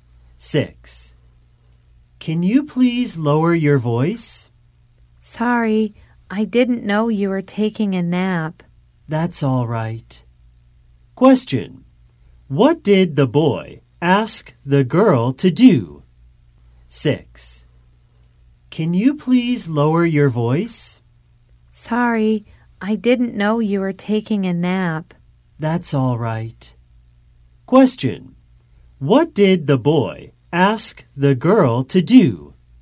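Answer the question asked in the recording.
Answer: Lower her voice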